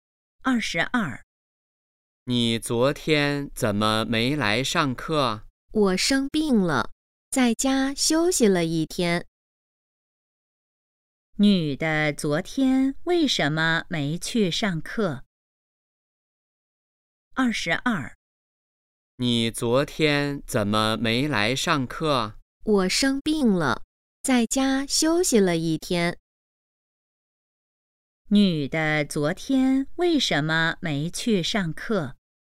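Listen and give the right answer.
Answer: 生病了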